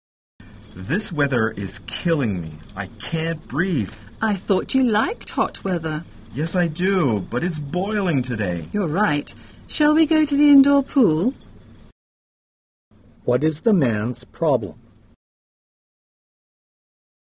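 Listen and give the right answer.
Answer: It is too hot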